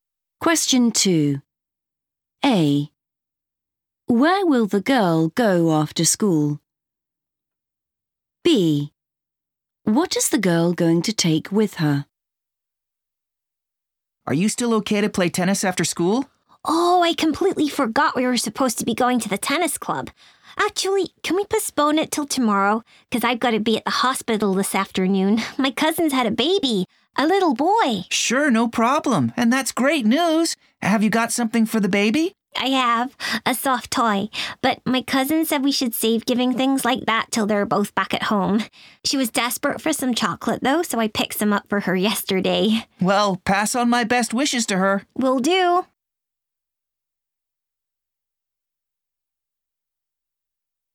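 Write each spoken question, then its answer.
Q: Where will the girl go after school?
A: the hospital

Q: What is the girl going to take with her?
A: chocolate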